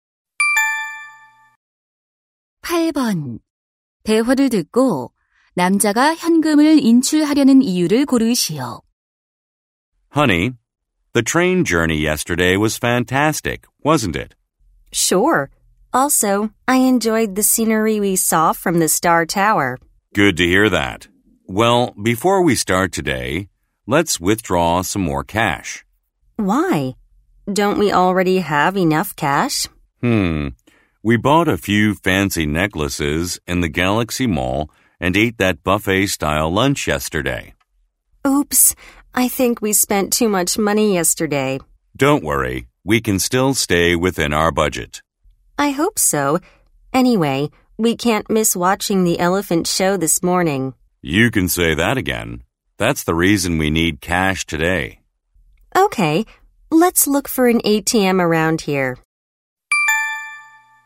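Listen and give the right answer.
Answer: 코끼리 쇼를 보기 위해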